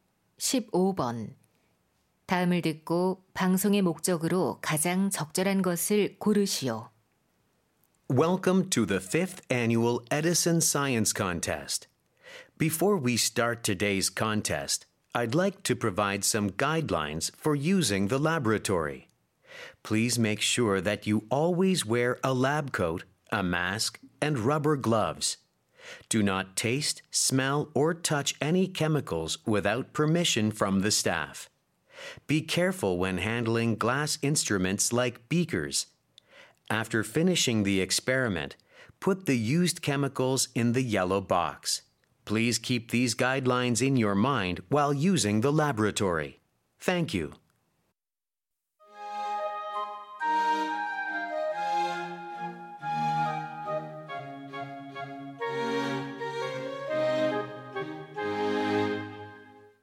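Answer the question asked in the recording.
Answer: 실험실 이용 수칙 안내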